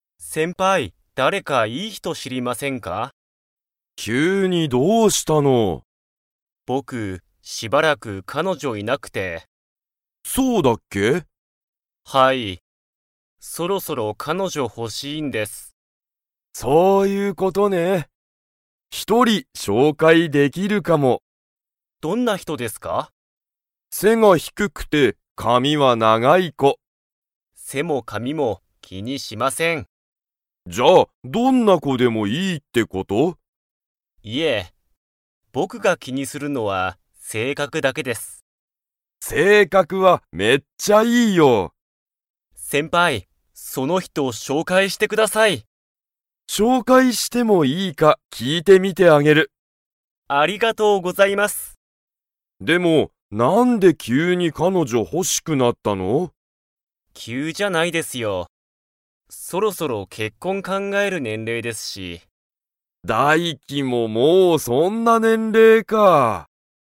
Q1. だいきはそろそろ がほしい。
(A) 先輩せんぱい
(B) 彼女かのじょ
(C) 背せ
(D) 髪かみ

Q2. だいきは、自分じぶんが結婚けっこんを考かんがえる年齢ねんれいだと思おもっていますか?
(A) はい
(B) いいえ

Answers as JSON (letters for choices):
{"1": "B", "2": "A"}

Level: Level 4